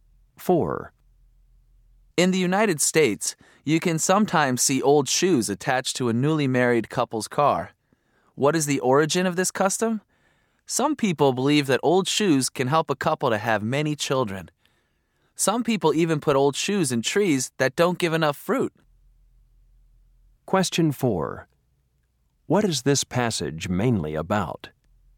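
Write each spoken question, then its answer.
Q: What is this passage mainly about?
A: The origin of the custom of attaching old shoes to a newly married couple's car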